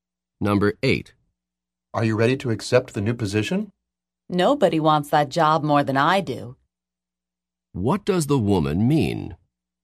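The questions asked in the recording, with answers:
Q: What does the woman mean?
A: She really wants the job and is ready to accept it.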